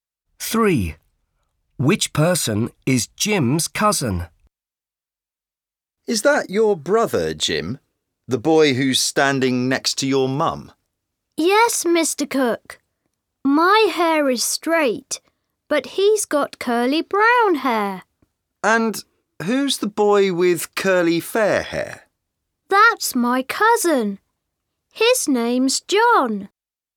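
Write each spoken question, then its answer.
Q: Which person is Jim's cousin?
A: The boy with curly fair hair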